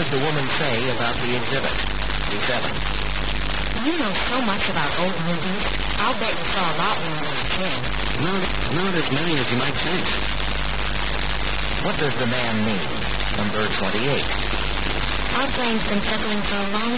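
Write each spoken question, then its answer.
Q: What does the man mean?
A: He didn't see many old movies as a child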